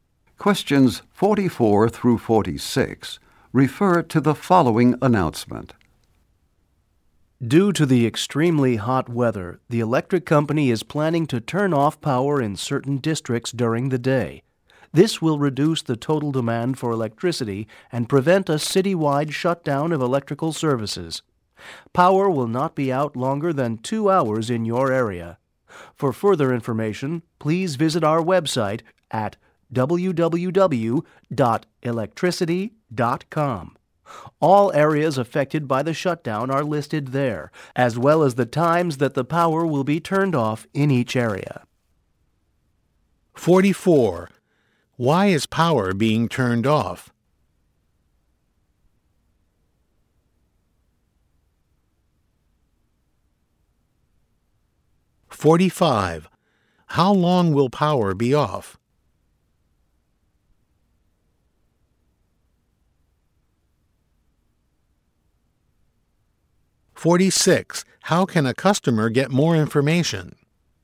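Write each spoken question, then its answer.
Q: Why is power being turned off?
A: Because of extremely hot weather, to reduce demand and prevent a citywide shutdown

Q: How long will power be off?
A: No longer than 2 hours

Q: How can a customer get more information?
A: By visiting the website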